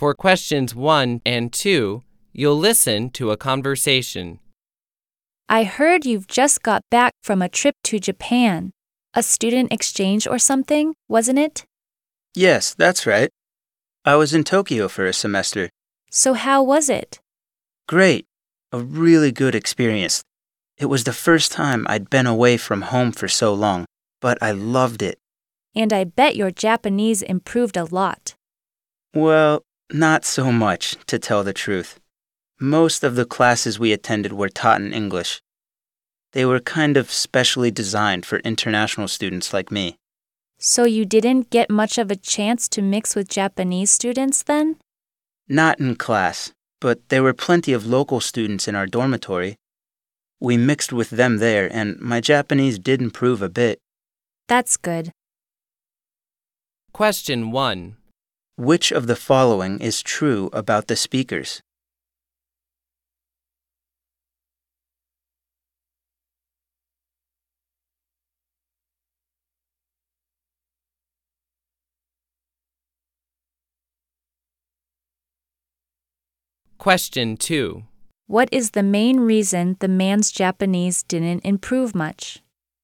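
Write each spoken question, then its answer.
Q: What is the main reason the man's Japanese didn't improve much?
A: Most of his classes were taught in English.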